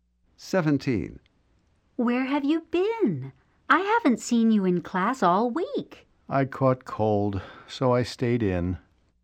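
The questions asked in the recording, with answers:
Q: What does the man mean?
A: He was sick, so he stayed home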